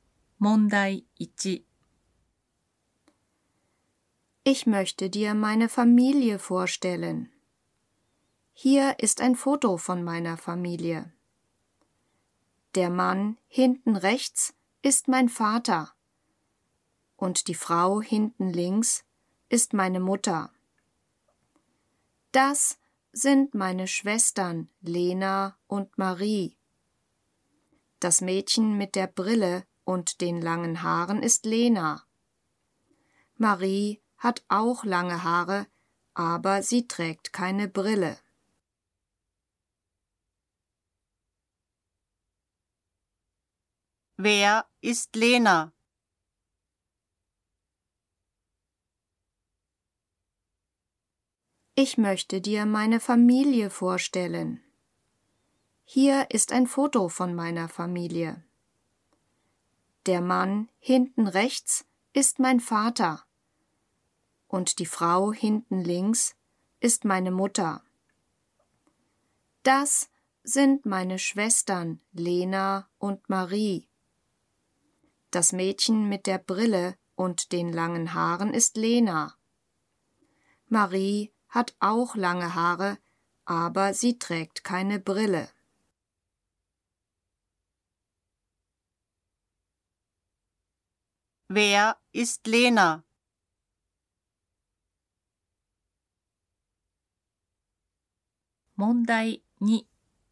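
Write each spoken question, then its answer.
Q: Wer ist Lena?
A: Das Mädchen mit der Brille und den langen Haaren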